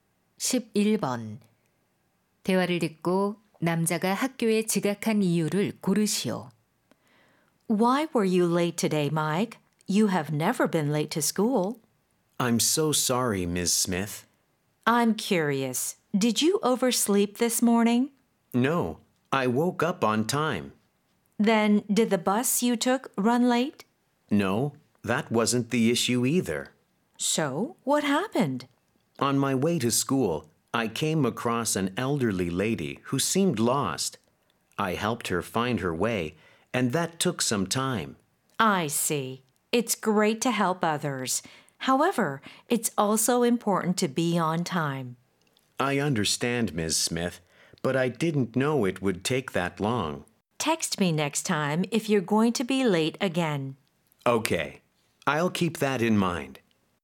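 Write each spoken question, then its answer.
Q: 대화를 듣고 남자가 학교에 지각한 이유를 고르시오.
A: 길을 잃은 할머니에게 길을 찾아 드려서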